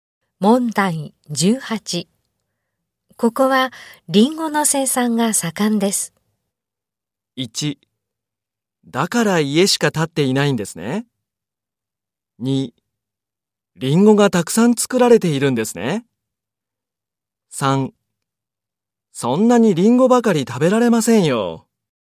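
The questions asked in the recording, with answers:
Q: ここはリンゴの生産が盛んです。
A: 2: リンゴがたくさん作られているんですね。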